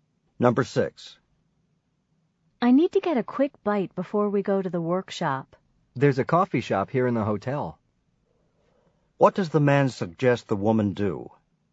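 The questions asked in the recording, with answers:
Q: What does the man suggest the woman do?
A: Get something to eat at the coffee shop in the hotel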